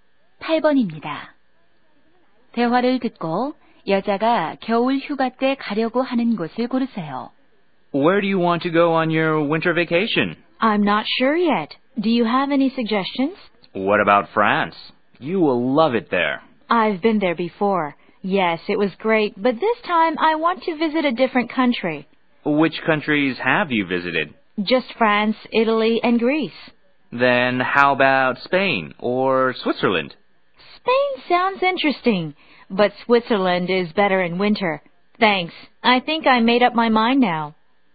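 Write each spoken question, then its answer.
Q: 대화를 듣고 여자가 겨울 휴가 때 가려고 하는 곳을 고르세요.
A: 스위스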